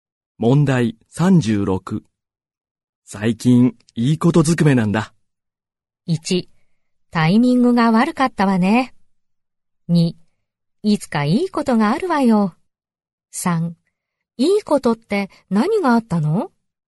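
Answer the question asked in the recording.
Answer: 3: いいことって何があったの?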